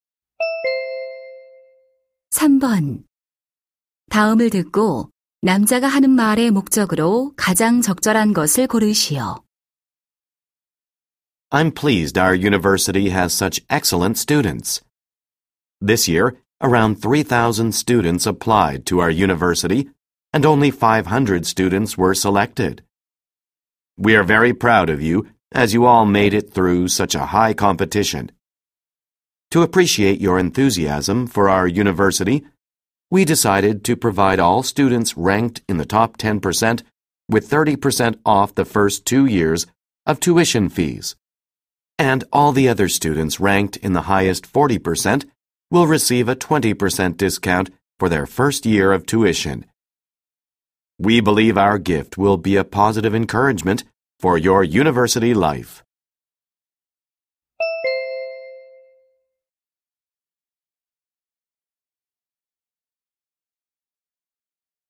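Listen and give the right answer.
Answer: 성적 우수 신입생에게 등록금 할인 혜택을 알리려고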